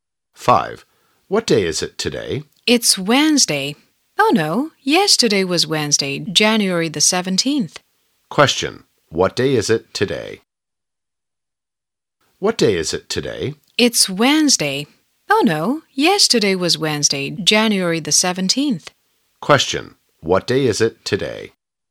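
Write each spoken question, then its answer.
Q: what day is it today?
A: Thursday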